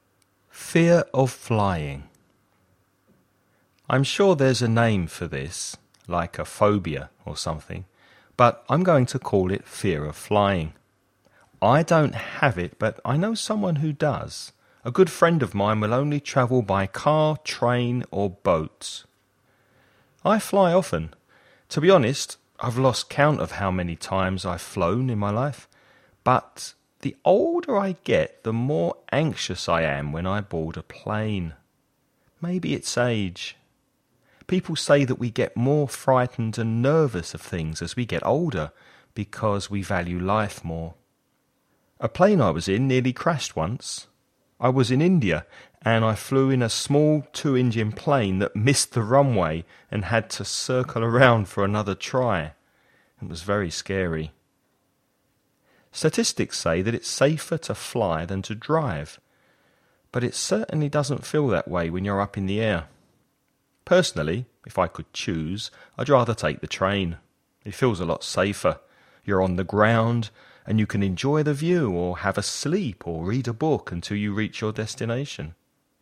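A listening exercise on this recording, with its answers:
Listen and write the questions you hear.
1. Which three means of transport does the speaker's friend prefer?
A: Car, train and boat

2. What does the speaker suggest is the reason why people become more afraid of things as they get older?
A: Because we value life more

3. Which country was the speaker travelling in when his plane nearly crashed?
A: India

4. The speaker uses all three forms of the verb 'to fly'. What are the second and third forms of this verb (the past tense and the past participle)?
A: flew, flown

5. What does the speaker say is his preferred form of transport?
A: The train

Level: nivel intermedio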